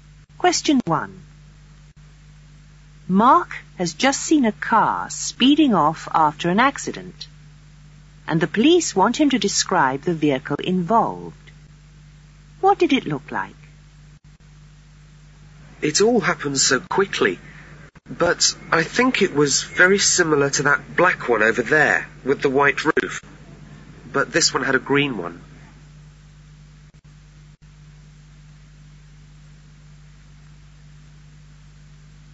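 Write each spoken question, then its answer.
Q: What did it look like?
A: Black with a green roof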